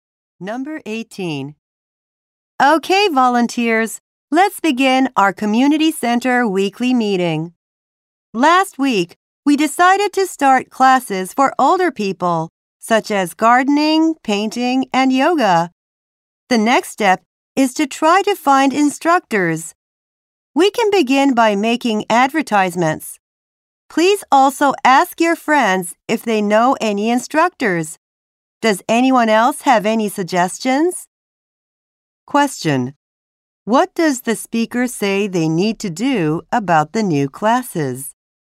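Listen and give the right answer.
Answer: Find instructors.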